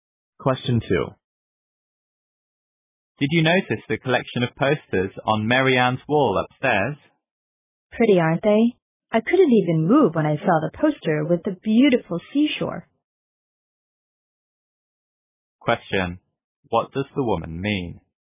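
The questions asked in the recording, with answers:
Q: What does the woman mean?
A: She was very impressed by the poster of the seashore.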